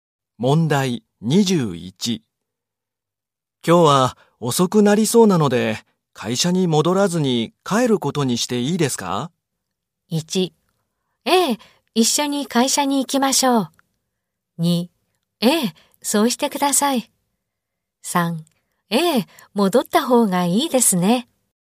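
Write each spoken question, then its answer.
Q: 今日は遅くなりそうなので、会社に戻らずに帰ることにしていいですか?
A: 2: ええ、そうしてください。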